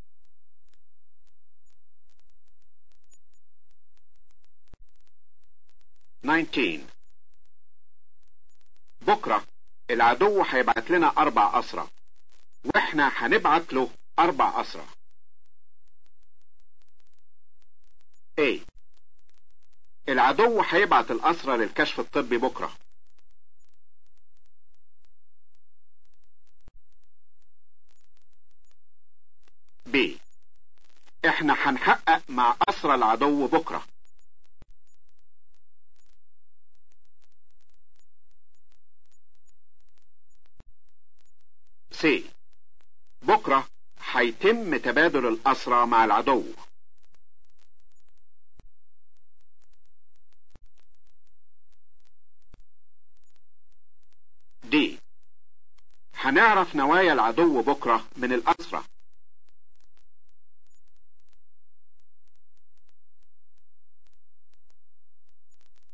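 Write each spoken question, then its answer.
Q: بكرة العدو هيبعت لنا 4 أسرى واحنا هنبعت له 4 أسرى.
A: C: بكرة حيتم تبادل الأسرى مع العدو.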